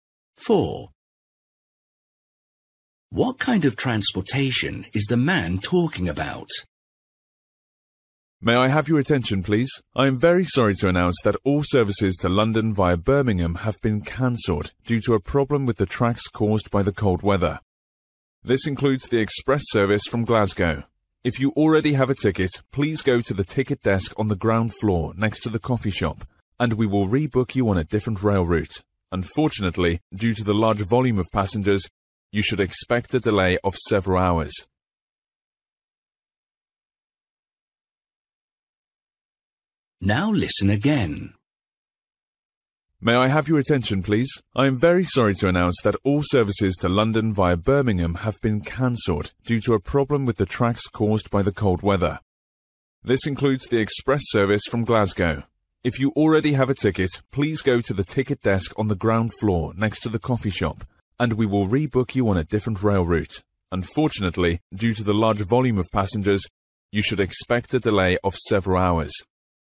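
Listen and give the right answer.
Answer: Train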